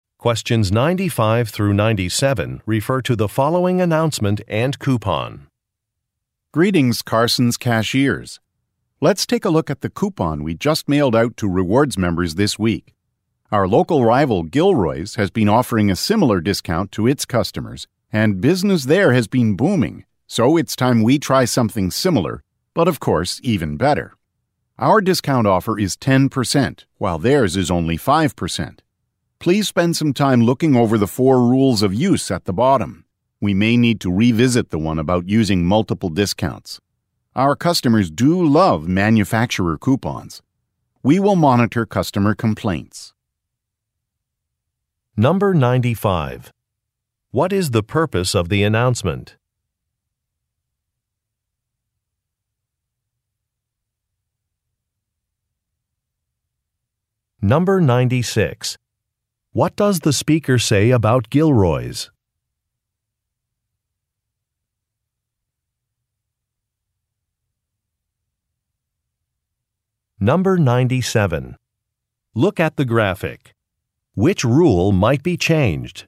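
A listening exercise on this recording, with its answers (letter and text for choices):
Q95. What is the purpose of the announcement?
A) To describe a new customer discount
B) To introduce new employees to the team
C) To announce the end of a rewards program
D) To review customer-complaint policies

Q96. What does the speaker say about Gilroy's?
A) It does not offer discounts.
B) It operates outside the local area.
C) It is a competitor.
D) It has strict rules for employees.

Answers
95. A) To describe a new customer discount
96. C) It is a competitor.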